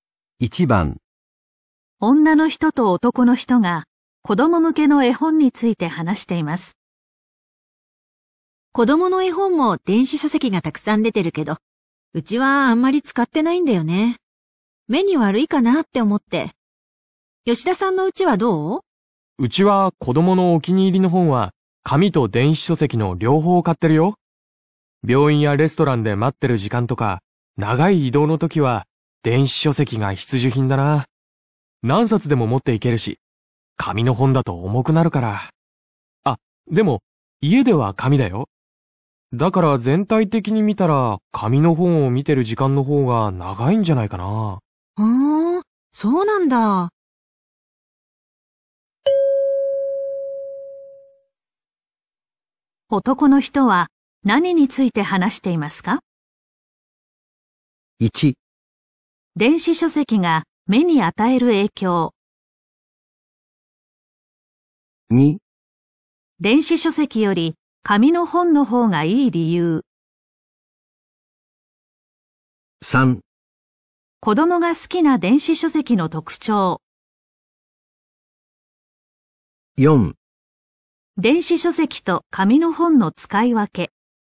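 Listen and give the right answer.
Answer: 4: 電子書籍と紙の本の使い分け。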